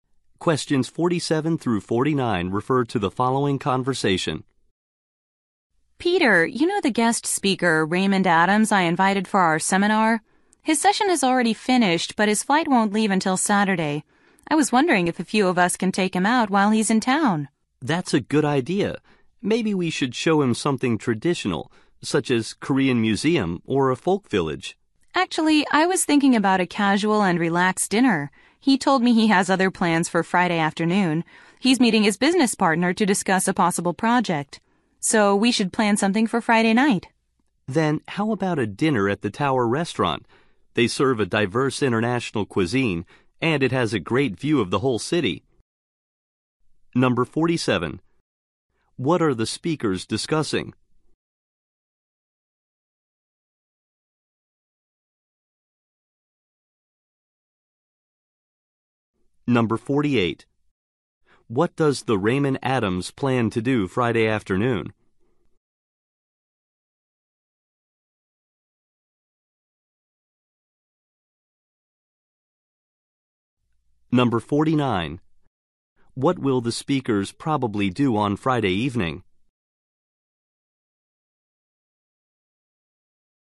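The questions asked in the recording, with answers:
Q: What are the speakers discussing?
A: Taking a guest speaker out

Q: What does the Raymond Adams plan to do Friday afternoon?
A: Meet his business partner

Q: What will the speakers probably do on Friday evening?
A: Have dinner at the Tower Restaurant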